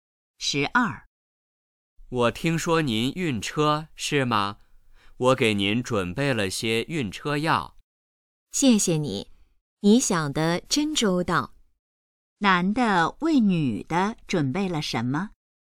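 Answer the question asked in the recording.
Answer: 晕车药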